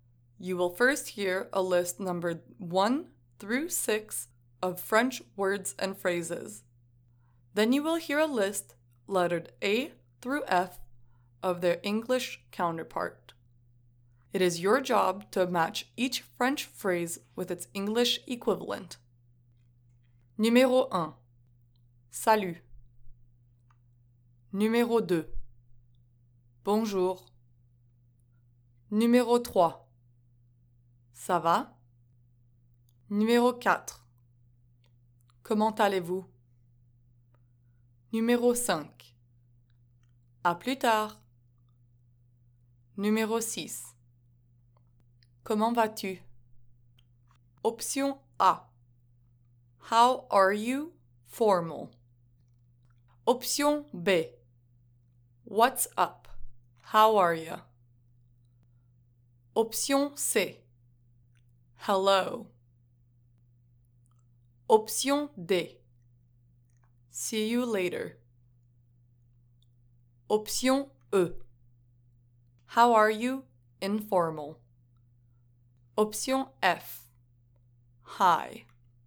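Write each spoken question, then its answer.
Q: Salut.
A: F: Hi.

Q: Bonjour.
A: C: Hello.

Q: Ça va?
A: B: What's up? How are you?

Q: Comment allez-vous?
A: A: How are you? Formal.

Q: À plus tard.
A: D: See you later.

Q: Comment vas-tu?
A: E: How are you? Informal.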